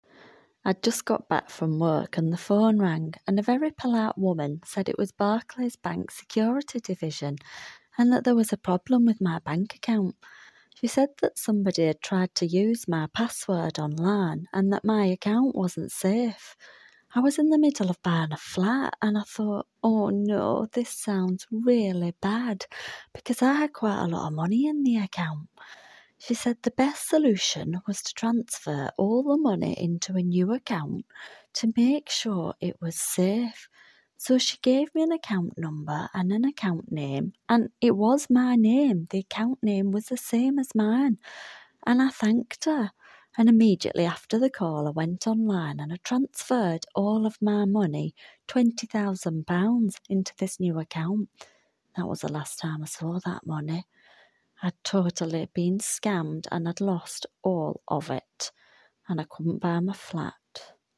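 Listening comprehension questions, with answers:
Tick all the sentences below which are TRUE about the recording. Do not include your own opinion, only use what is on the audio, for your answers.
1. The woman had been at work before the phone call.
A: True

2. She received a genuine call from the bank.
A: False

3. She was asked to transfer the money in her account to another one.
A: True

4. She was unable to buy the car that she wanted.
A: False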